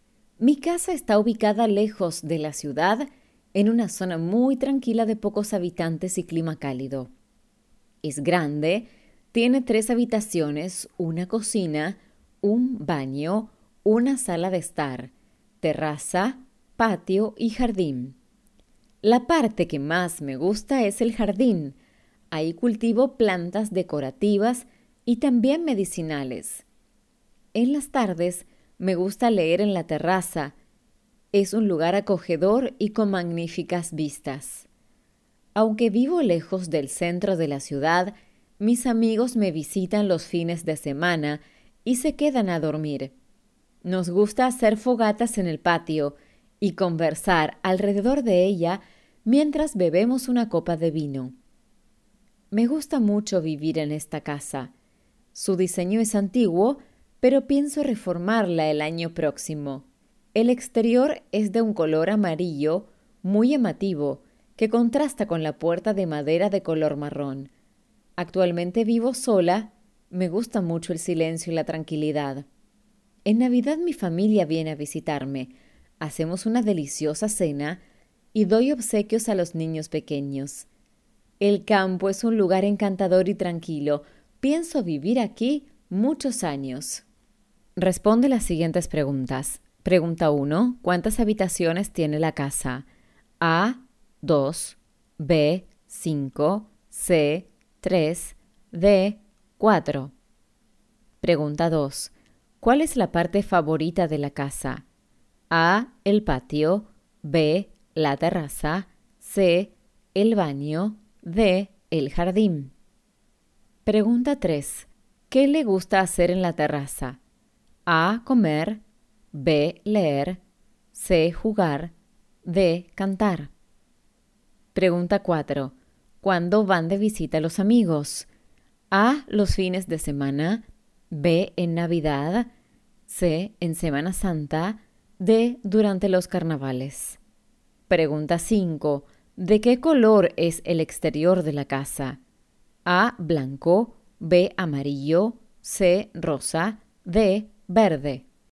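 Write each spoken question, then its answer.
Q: ¿Cuántas habitaciones tiene la casa?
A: C: 3

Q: ¿Cuál es la parte favorita de la casa?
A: D: El jardín

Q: ¿Qué le gusta hacer en la terraza?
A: B: Leer

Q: ¿Cuándo van de visita los amigos?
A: A: Los fines de semana

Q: ¿De qué color es el exterior de la casa?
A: B: Amarillo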